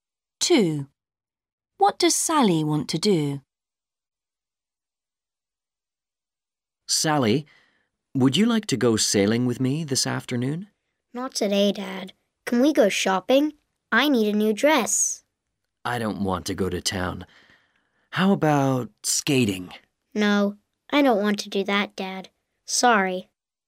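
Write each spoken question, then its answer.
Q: What does Sally want to do?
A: go shopping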